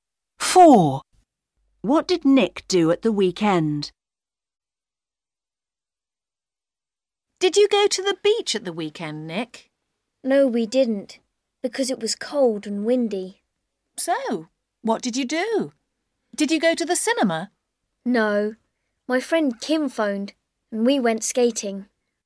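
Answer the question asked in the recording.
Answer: He went skating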